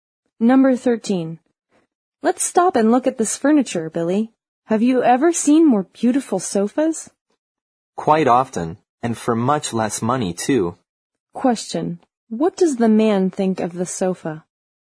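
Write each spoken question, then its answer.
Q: What does the man think of the sofa?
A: It is overpriced; he has seen nicer ones for less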